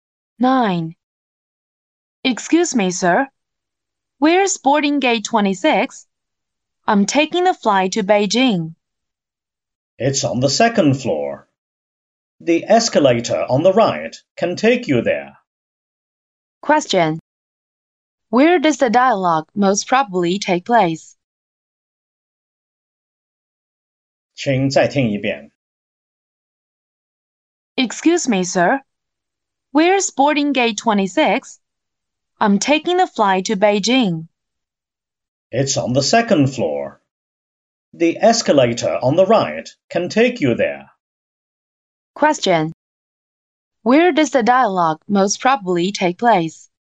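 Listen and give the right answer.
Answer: At an airport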